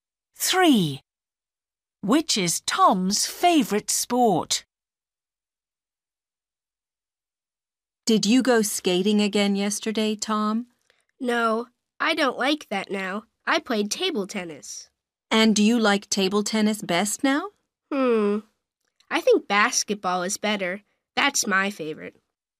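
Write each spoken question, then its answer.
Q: Which is Tom's favorite sport?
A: Basketball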